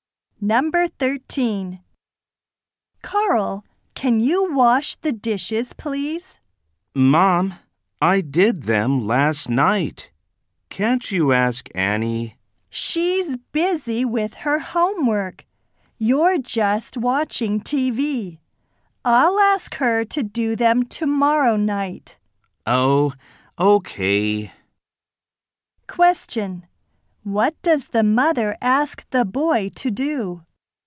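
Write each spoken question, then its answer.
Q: What does the mother ask the boy to do?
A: Wash the dishes.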